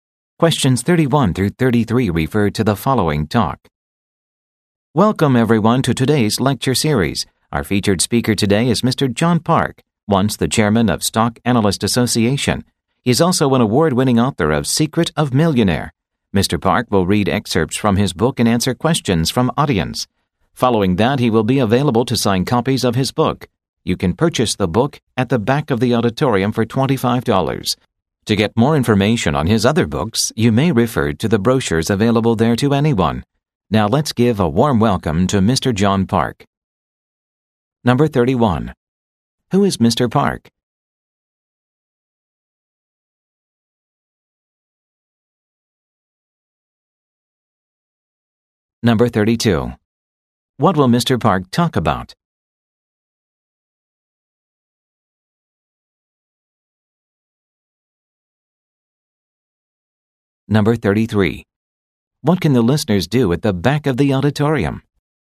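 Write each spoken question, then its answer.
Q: What can the listeners do at the back of the auditorium?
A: Buy his book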